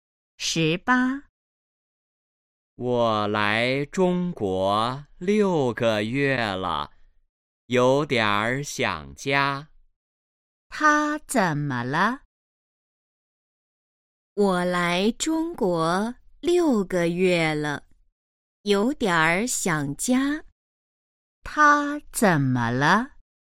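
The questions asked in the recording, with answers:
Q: 他怎么了?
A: 有点儿想家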